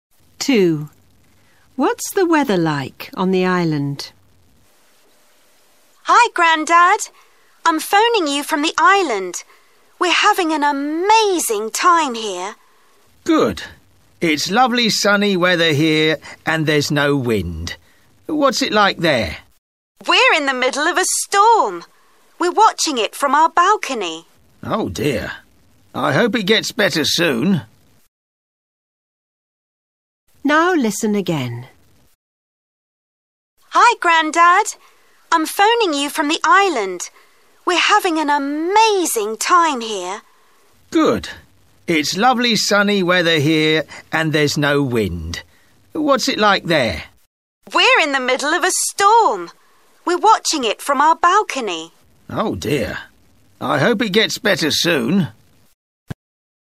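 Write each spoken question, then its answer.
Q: What's the weather like on the island?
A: Stormy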